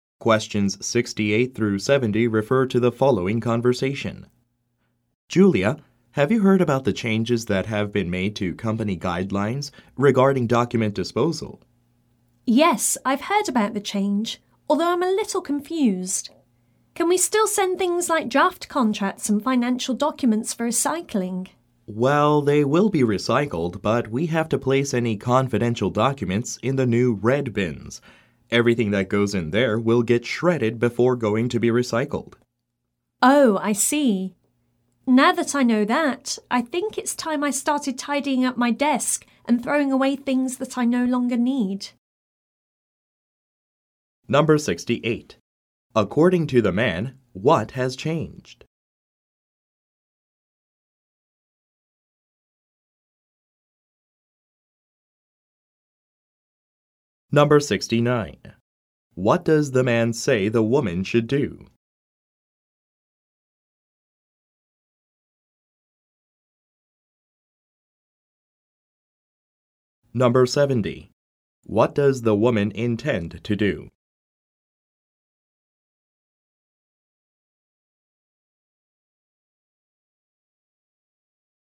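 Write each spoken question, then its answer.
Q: According to the man, what has changed?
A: The company guidelines on document disposal

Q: What does the man say the woman should do?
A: Put confidential documents in the new red bins

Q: What does the woman intend to do?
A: Tidy up her desk and throw away things she no longer needs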